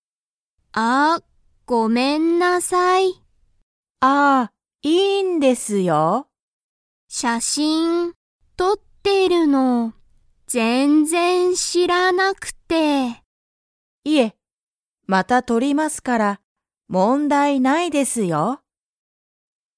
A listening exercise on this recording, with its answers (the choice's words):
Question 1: ハルは写真(しゃしん)をとりましたか?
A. はい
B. いいえ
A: いいえ